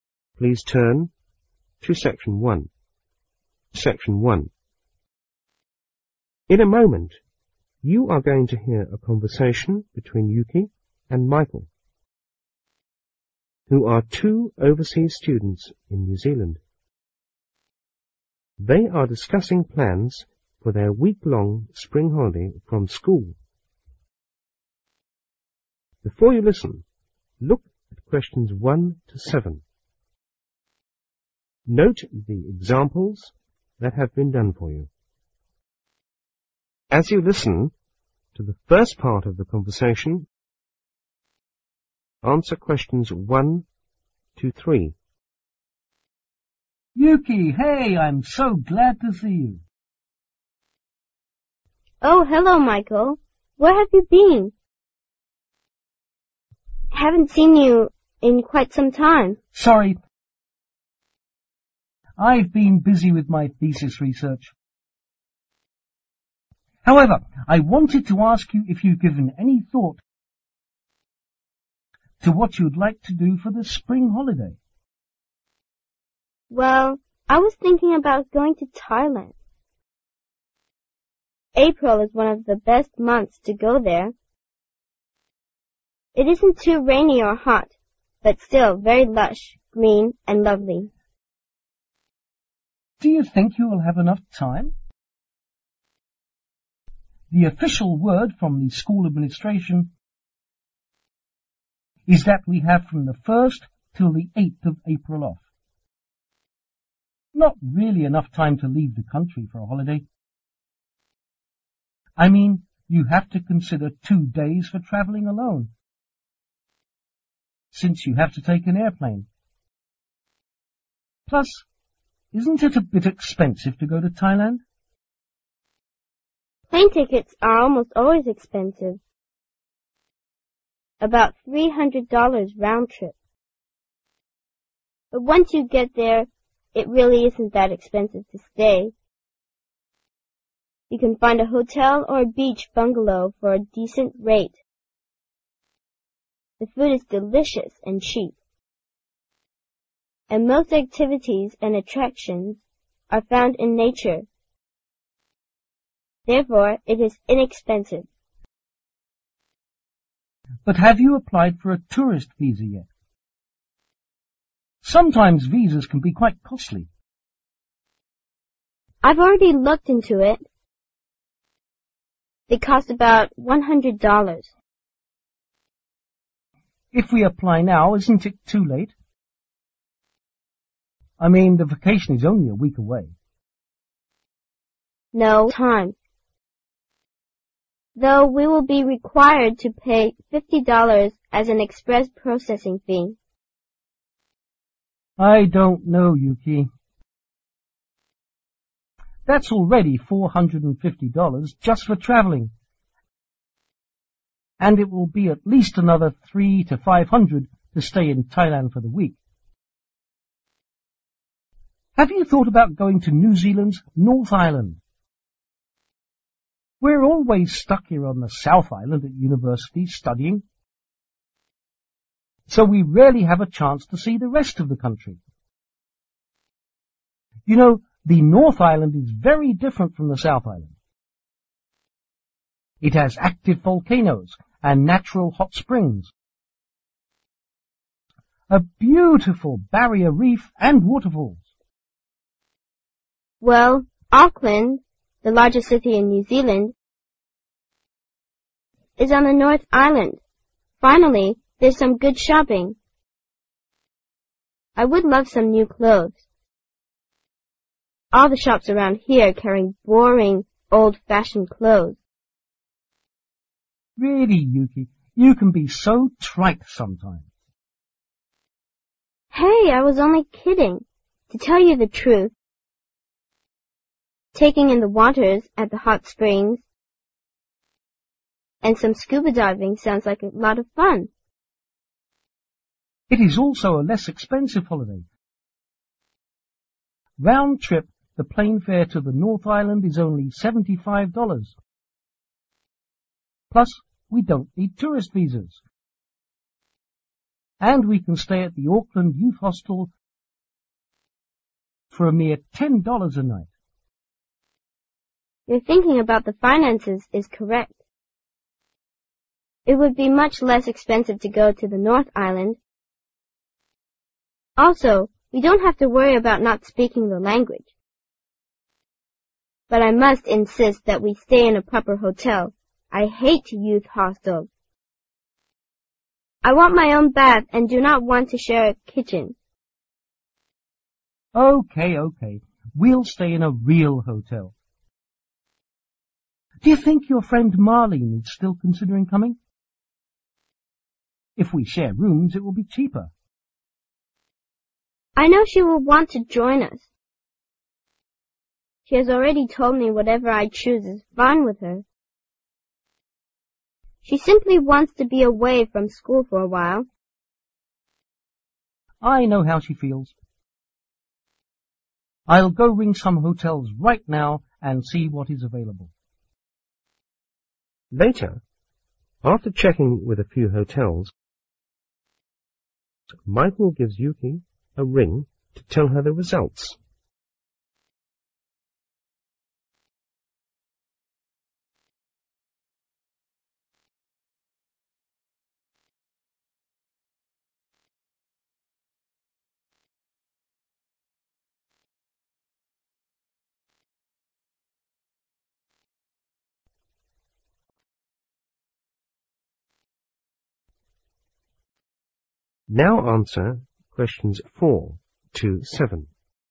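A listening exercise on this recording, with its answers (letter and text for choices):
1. Yuki wants to go to ( ).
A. Vietnam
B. Sri Lanka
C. Thailand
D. Malaysia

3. Yuki thinks going to the North Island could be a good idea because ( )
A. she can stay in a youth hostel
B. there will be no language difference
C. her friend Marlence lives there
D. there are no large cities or crowds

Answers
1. C. Thailand
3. B. there will be no language difference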